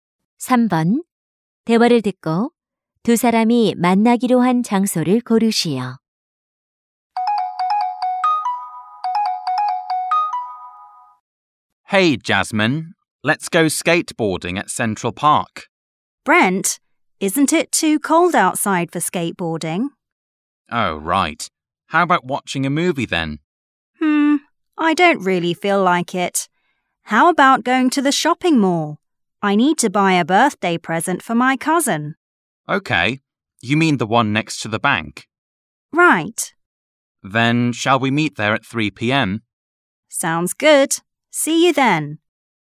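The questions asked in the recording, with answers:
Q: 대화를 듣고 두 사람이 만나기로 한 장소를 고르시오.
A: 쇼핑몰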